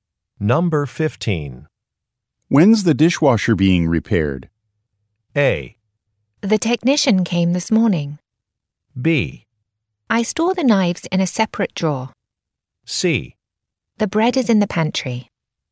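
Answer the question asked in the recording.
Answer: A: The technician came this morning.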